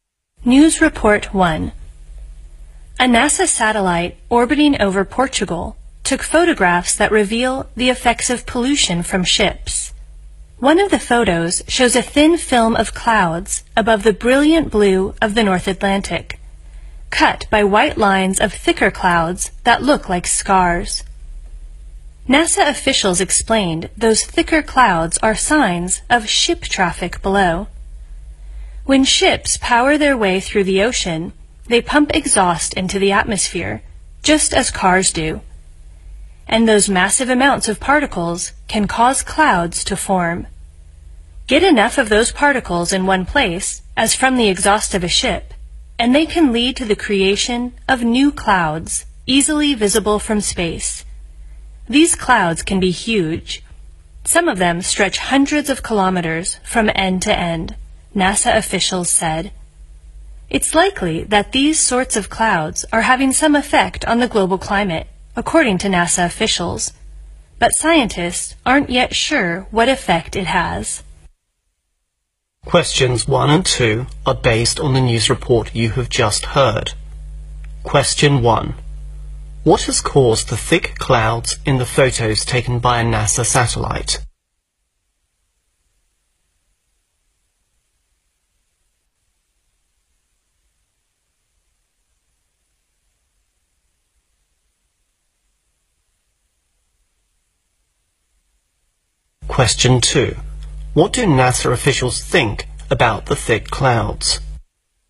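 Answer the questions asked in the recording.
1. Exhaust from ships
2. They likely have some effect on the global climate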